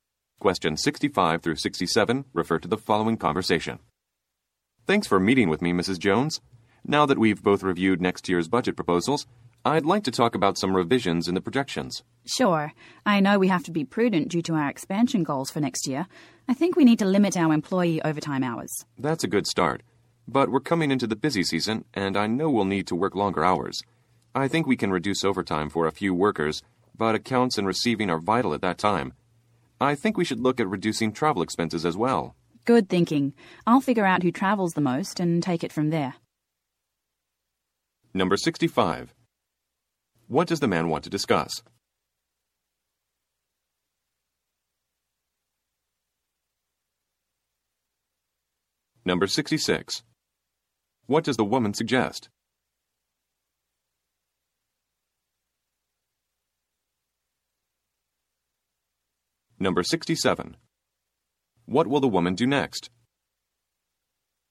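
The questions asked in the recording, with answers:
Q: What does the man want to discuss?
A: Revisions to the budget projections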